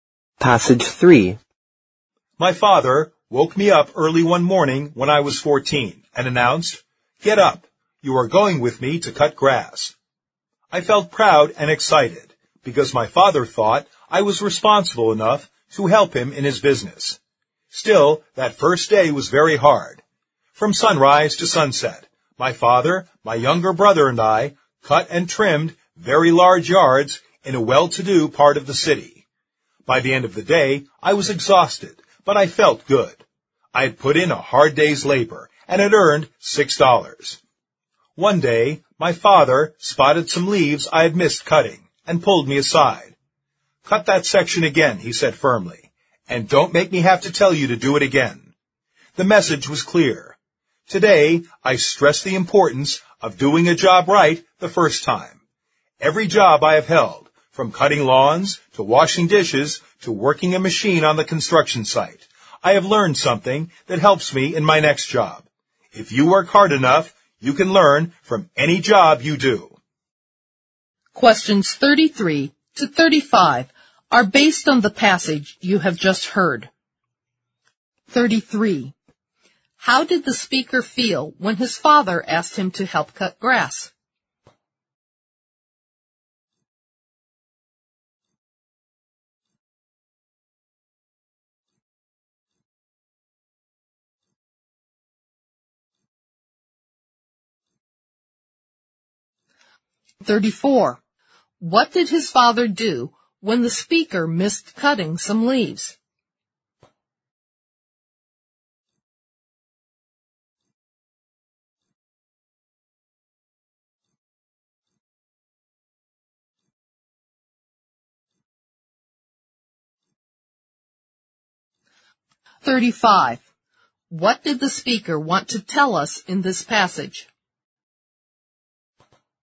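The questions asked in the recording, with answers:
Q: How did the speaker feel when his father asked him to help cut grass?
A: Proud and excited

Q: What did his father do when the speaker missed cutting some leaves?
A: He told him firmly to cut that section again

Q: What did the speaker want to tell us in this passage?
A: If you work hard enough, you can learn from any job you do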